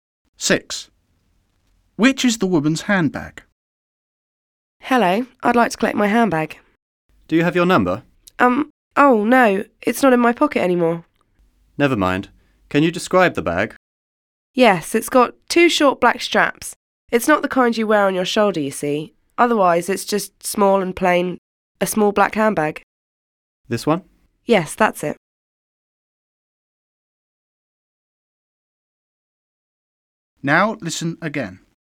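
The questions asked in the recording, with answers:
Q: Which is the woman's handbag?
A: A small, plain black handbag with two short black straps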